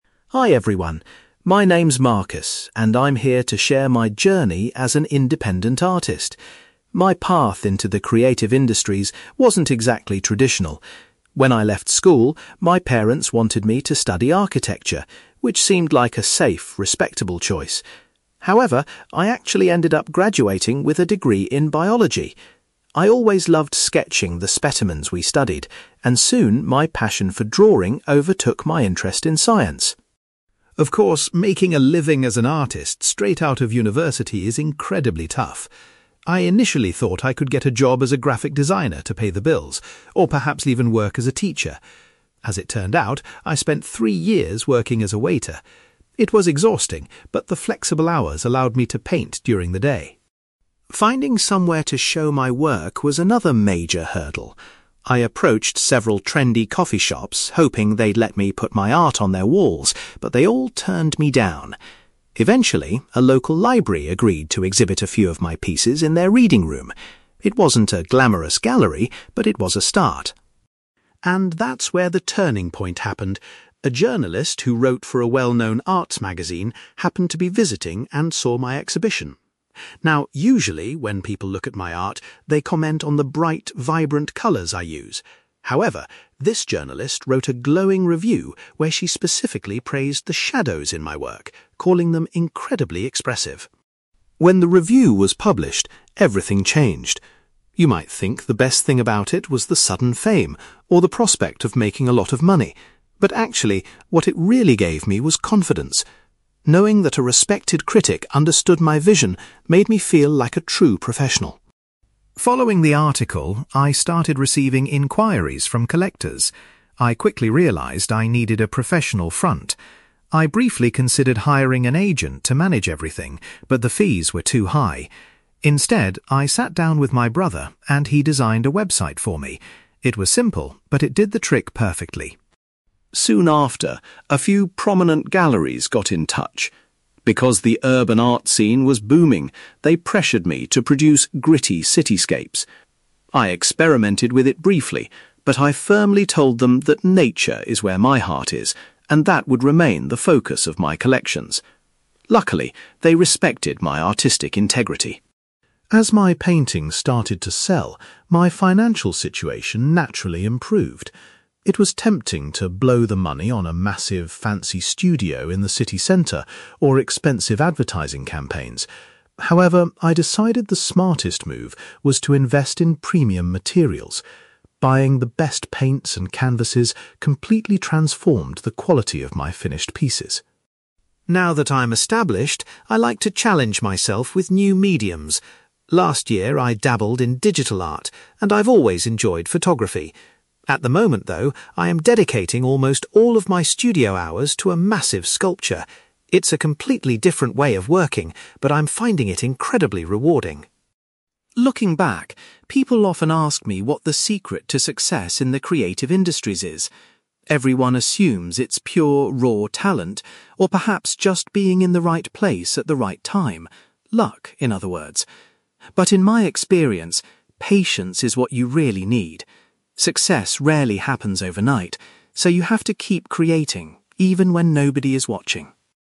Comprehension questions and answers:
You will hear an independent artist called Marcus giving a presentation about the turning point in his career. For questions 9-18, complete the sentences with a word or short phrase.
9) Marcus originally obtained a degree in (9)........................... before focusing entirely on art.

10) During his early years as an artist, Marcus supported himself by working as a (10)........................... .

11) Marcus first displayed his paintings in a (11)........................... instead of a traditional gallery.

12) The journalist was particularly impressed by the (12)........................... in Marcus's paintings.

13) Receiving a positive review primarily gave Marcus the (13)........................... to continue his career.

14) Marcus asked his brother to create a (14)........................... to help people contact him.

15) When galleries contacted Marcus, he insisted that his main focus would remain on (15)........................... .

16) Marcus used his increased income to buy higher quality (16)........................... for his art.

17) Marcus is currently spending his time working on a large (17)........................... .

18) According to Marcus, the most important quality for any new artist is (18)........................... .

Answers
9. biology
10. waiter
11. local library
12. shadows
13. confidence
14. website
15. nature
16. materials
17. sculpture
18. patience

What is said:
Marcus: Hi everyone. My name is Marcus, and I'm here to share my journey as an independent artist. My path into the creative industries wasn't exactly traditional. When I left school, my parents wanted me to study architecture, which seemed like a safe, respectable choice. However, I actually ended up graduating with a degree in biology. I always loved sketching the specimens we studied, and soon, my passion for drawing overtook my interest in science.
Of course, making a living as an artist straight out of university is incredibly tough. I initially thought I could get a job as a graphic designer to pay the bills, or perhaps even work as a teacher. As it turned out, I spent three years working as a waiter. It was exhausting, but the flexible hours allowed me to paint during the day.
Finding somewhere to show my work was another major hurdle. I approached several trendy coffee shops hoping they'd let me put my art on their walls, but they all turned me down. Eventually, a local library agreed to exhibit a few of my pieces in their reading room. It wasn't a glamorous gallery, but it was a start.
And that's where the turning point happened. A journalist who wrote for a well-known arts magazine happened to be visiting and saw my exhibition. Now, usually, when people look at my art, they comment on the bright, vibrant colours I use. However, this journalist wrote a glowing review where she specifically praised the shadows in my work, calling them incredibly expressive.
When the review was published, everything changed. You might think the best thing about it was the sudden fame, or the prospect of making a lot of money. But actually, what it really gave me was confidence. Knowing that a respected critic understood my vision made me feel like a true professional.
Following the article, I started receiving inquiries from collectors. I quickly realised I needed a professional front. I briefly considered hiring an agent to manage everything, but the fees were too high. Instead, I sat down with my brother and he designed a website for me. It was simple, but it did the trick perfectly.
Soon after, a few prominent galleries got in touch. Because the urban art scene was booming, they pressured me to produce gritty cityscapes. I experimented with it briefly, but I firmly told them that nature is where my heart is, and that would remain the focus of my collections. Luckily, they respected my artistic integrity.
As my paintings started to sell, my financial situation naturally improved. It was tempting to blow the money on a massive, fancy studio in the city centre, or expensive advertising campaigns. However, I decided the smartest move was to invest in premium materials. Buying the best paints and canvases completely transformed the quality of my finished pieces.
Now that I'm established, I like to challenge myself with new mediums. Last year I dabbled in digital art, and I've always enjoyed photography. At the moment, though, I am dedicating almost all of my studio hours to a massive sculpture. It's a completely different way of working, but I'm finding it incredibly rewarding.
Looking back, people often ask me what the secret to success in the creative industries is. Everyone assumes it's pure, raw talent, or perhaps just being in the right place at the right time—luck, in other words. But in my experience, patience is what you really need. Success rarely happens overnight, so you have to keep creating, even when nobody is watching.

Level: B2